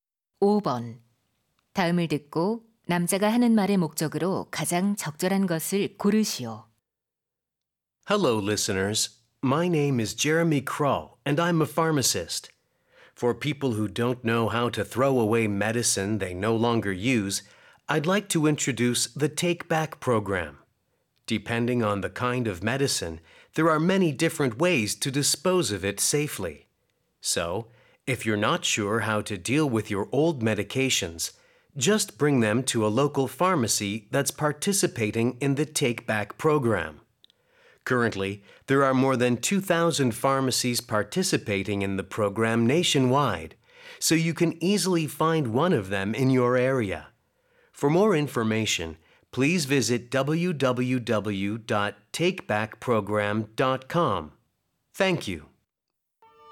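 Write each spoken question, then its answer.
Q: 다음을 듣고 남자가 하는 말의 목적으로 가장 적절한 것을 고르시오.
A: 안 쓰는 약을 안전하게 처리하는 Take Back 프로그램 소개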